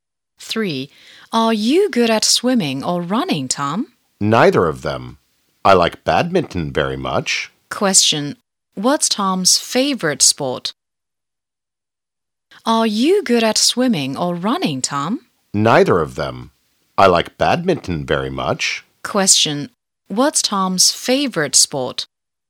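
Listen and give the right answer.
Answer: Badminton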